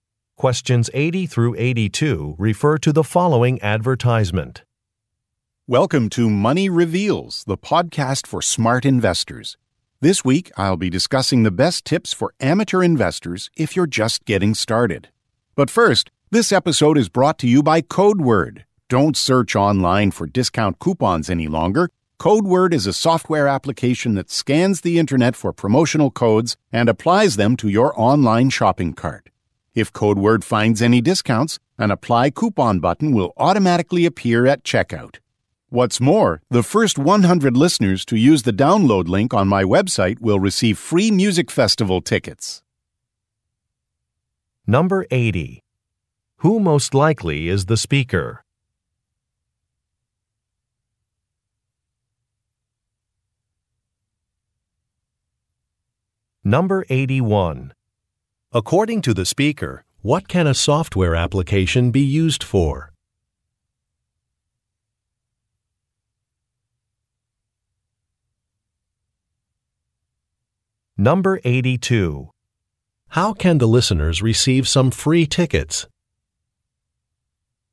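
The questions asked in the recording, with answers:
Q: Who most likely is the speaker?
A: A podcast host

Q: According to the speaker, what can a software application be used for?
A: Finding and applying discount codes for online shopping

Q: How can the listeners receive some free tickets?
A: By being among the first 100 to use the download link on the speaker's website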